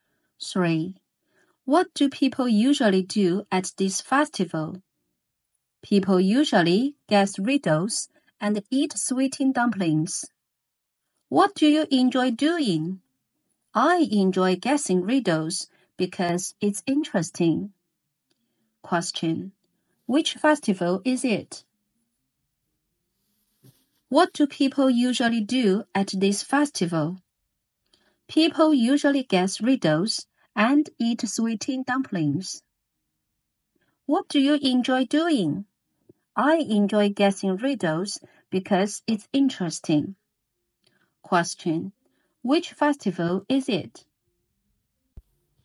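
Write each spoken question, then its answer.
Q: Which festival is it?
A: The Lantern Festival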